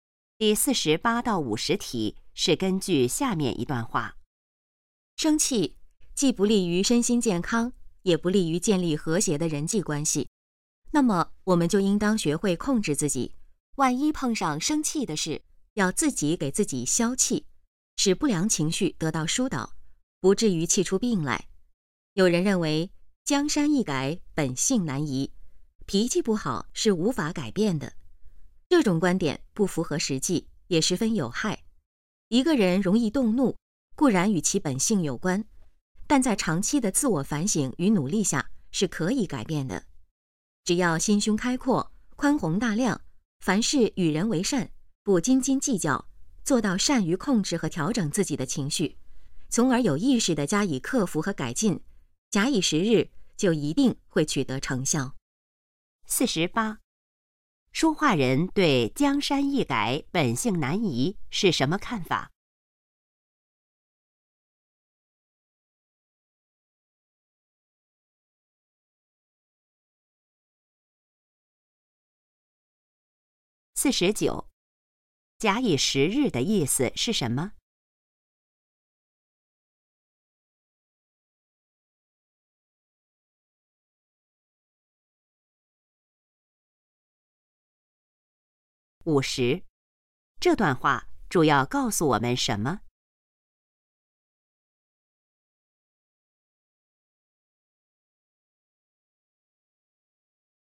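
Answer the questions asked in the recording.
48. 不符合实际,脾气可以改变
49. 给予一段时间
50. 要学会控制自己的情绪,不要生气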